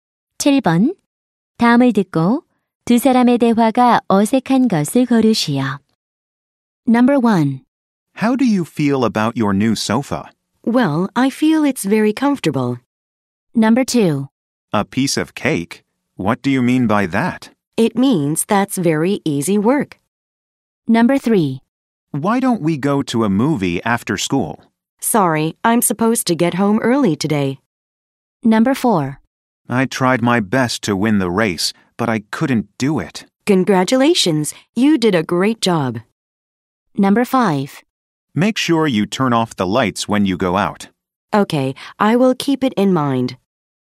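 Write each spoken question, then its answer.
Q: 다음을 듣고 두 사람의 대화가 어색한 것을 고르시오.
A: 4: I tried my best to win the race, but I couldn't do it. / Congratulations, you did a great job.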